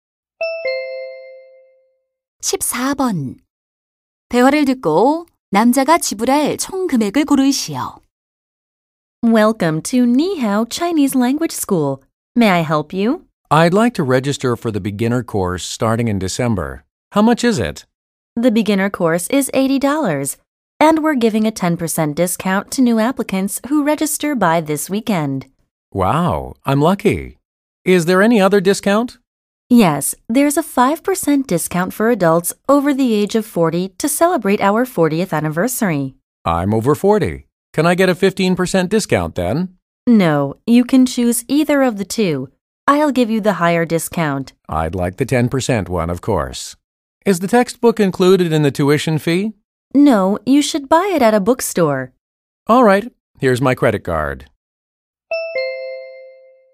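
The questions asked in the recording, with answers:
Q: 대화를 듣고 남자가 지불할 총 금액을 고르시오.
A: $72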